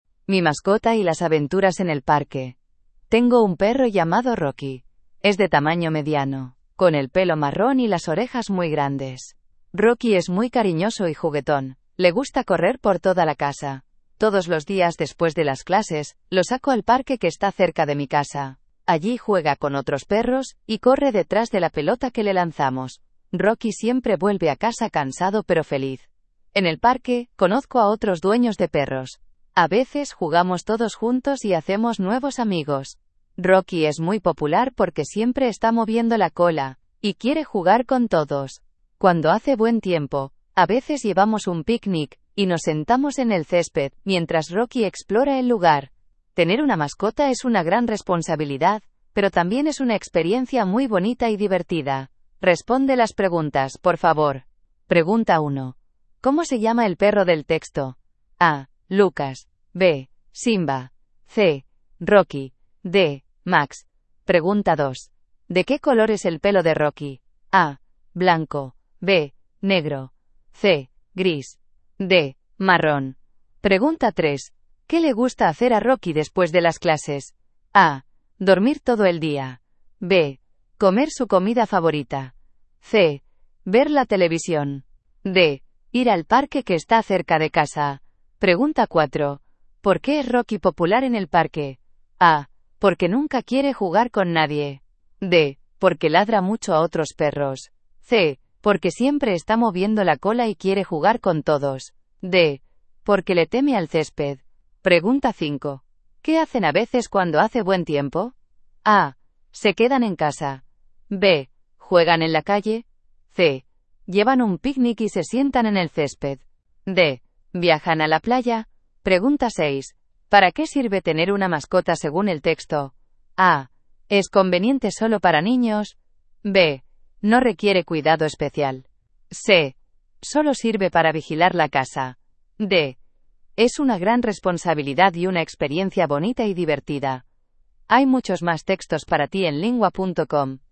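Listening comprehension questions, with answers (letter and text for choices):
Dann beantworte die folgenden Fragen zum Text:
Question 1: ¿Cómo se llama el perro del texto?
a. Lucas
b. Simba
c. Rocky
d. Max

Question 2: ¿De qué color es el pelo de Rocky?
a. Blanco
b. Negro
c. Gris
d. Marrón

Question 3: ¿Qué le gusta hacer a Rocky después de las clases?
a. Dormir todo el día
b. Comer su comida favorita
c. Ver la televisión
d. Ir al parque que está cerca de casa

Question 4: ¿Por qué es Rocky popular en el parque?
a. Porque nunca quiere jugar con nadie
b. Porque ladra mucho a otros perros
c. Porque siempre está moviendo la cola y quiere jugar con todos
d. Porque le teme al césped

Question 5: ¿Qué hacen a veces cuando hace buen tiempo?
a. Se quedan en casa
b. Juegan en la calle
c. Llevan un picnic y se sientan en el césped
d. Viajan a la playa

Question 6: ¿Para qué sirve tener una mascota según el texto?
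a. Es conveniente solo para niños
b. No requiere cuidado especial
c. Solo sirve para vigilar la casa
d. Es una gran responsabilidad y una experiencia bonita y divertida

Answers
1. c. Rocky
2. d. Marrón
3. d. Ir al parque que está cerca de casa
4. c. Porque siempre está moviendo la cola y quiere jugar con todos
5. c. Llevan un picnic y se sientan en el césped
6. d. Es una gran responsabilidad y una experiencia bonita y divertida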